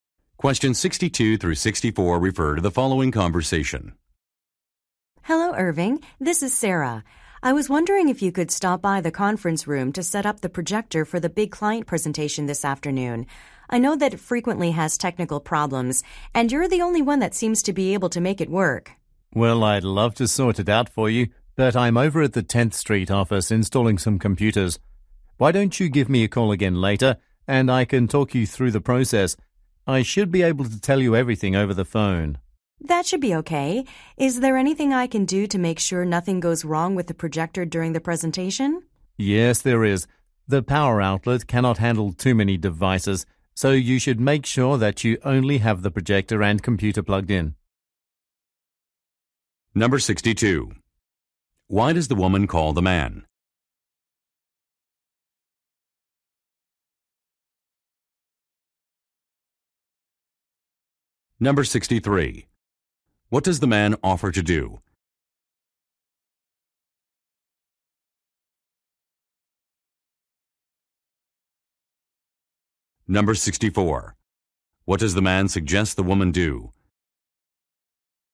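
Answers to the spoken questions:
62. To ask him to set up the projector
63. Talk her through the setup by phone
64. Plug in only the projector and the computer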